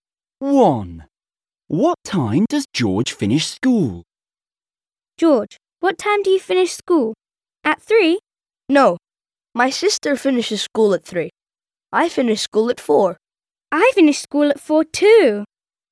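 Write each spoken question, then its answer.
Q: What time does George finish school?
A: At 4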